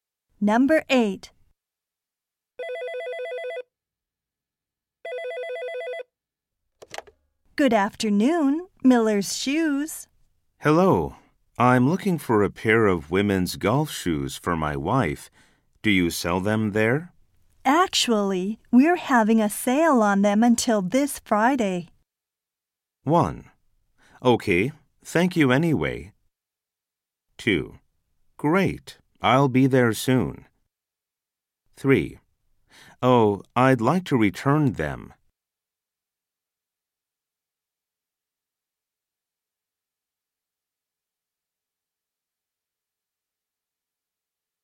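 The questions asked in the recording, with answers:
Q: Actually, we're having a sale on them until this Friday.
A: 2: Great, I'll be there soon.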